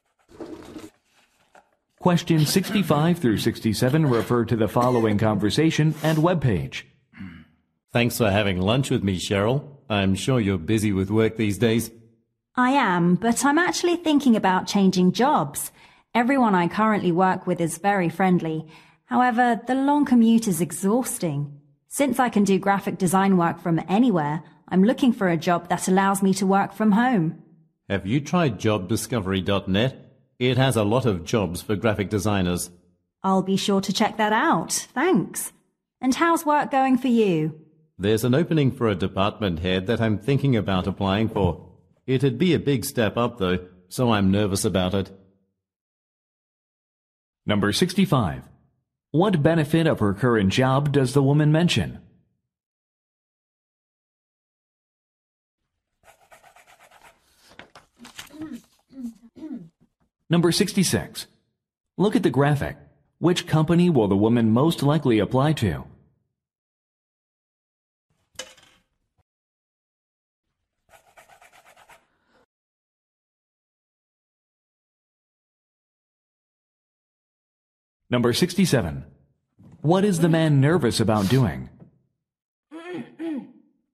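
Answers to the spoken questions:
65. Friendly coworkers
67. Applying for a department head position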